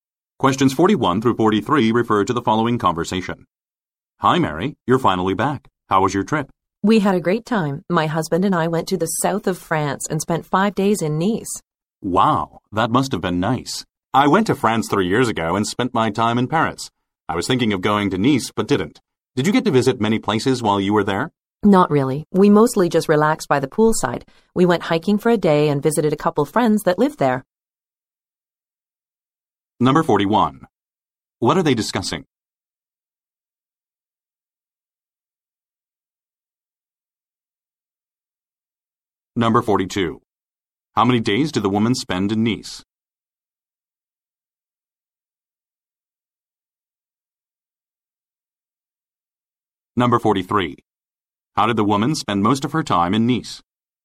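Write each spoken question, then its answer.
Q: What are they discussing?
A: The woman's trip to France

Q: How many days did the woman spend in Nice?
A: 5 days

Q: How did the woman spend most of her time in Nice?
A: Relaxing by the poolside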